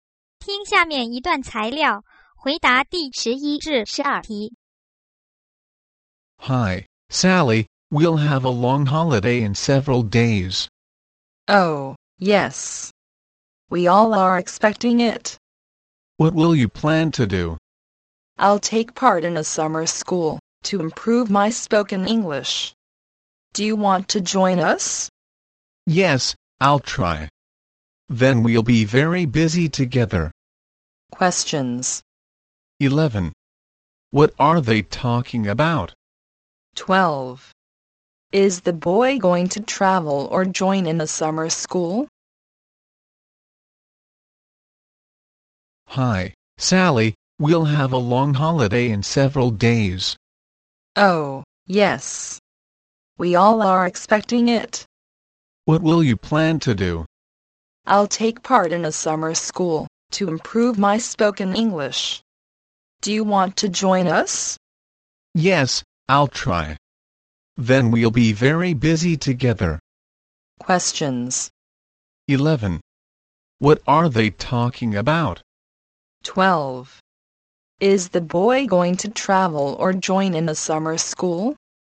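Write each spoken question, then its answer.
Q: What are they talking about?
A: Their plans for the long holiday

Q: Is the boy going to travel or join in a summer school?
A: Join in a summer school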